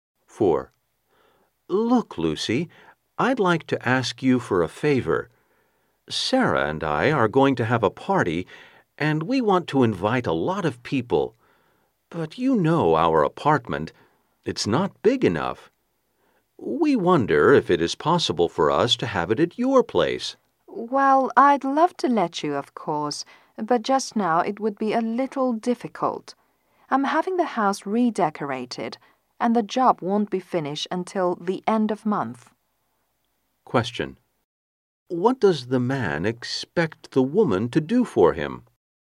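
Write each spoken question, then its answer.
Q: What does the man expect the woman to do for him?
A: Let them have the party at her place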